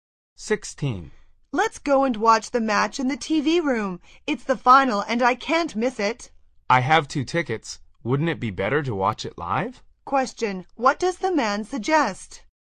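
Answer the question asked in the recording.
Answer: Going to watch the final live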